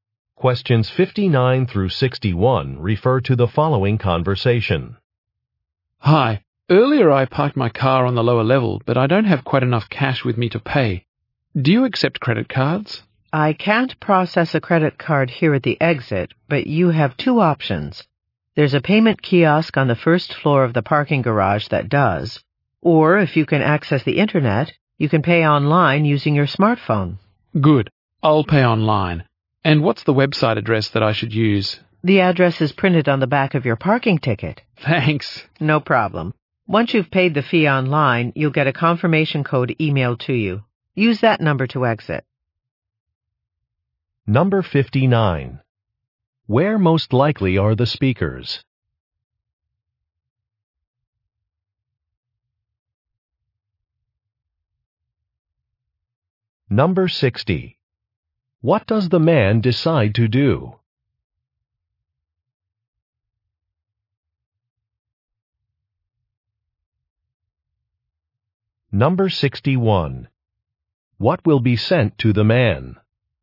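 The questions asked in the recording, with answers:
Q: Where most likely are the speakers?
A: At a parking garage exit

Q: What does the man decide to do?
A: Pay online

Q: What will be sent to the man?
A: A confirmation code by email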